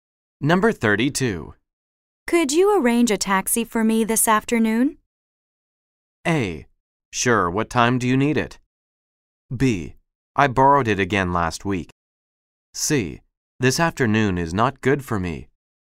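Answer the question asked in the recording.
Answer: A: Sure, what time do you need it?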